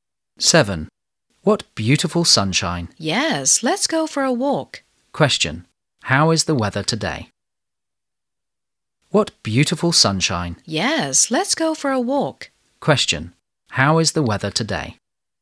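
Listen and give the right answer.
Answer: Sunny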